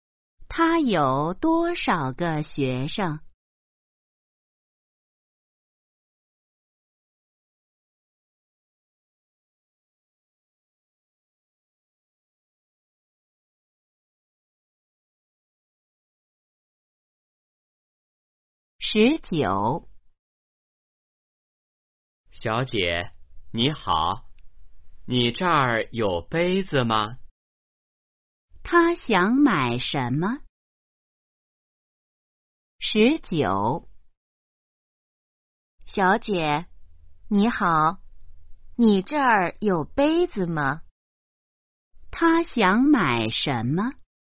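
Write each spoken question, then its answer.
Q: 他想买什么?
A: 杯子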